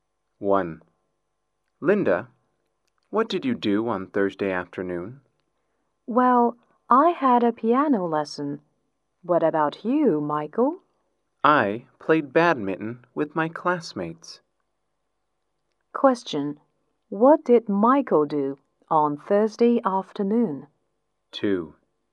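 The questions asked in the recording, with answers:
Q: What did Michael do on Thursday afternoon?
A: He played badminton with his classmates.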